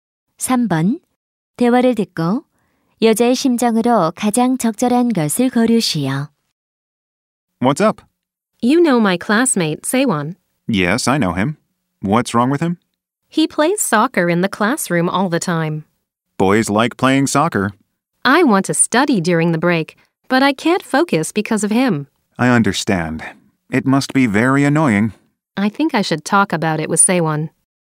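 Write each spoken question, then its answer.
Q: 대화를 듣고 여자의 심정으로 가장 적절한 것을 고르시오.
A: 짜증남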